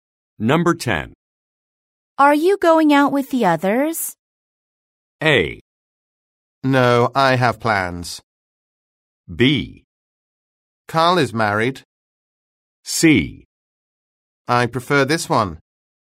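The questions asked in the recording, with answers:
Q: Are you going out with the others?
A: A: No, I have plans.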